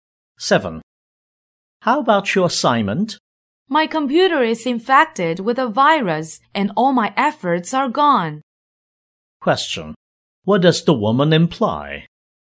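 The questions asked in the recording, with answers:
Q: What does the woman imply?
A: Her assignment was lost because of a computer virus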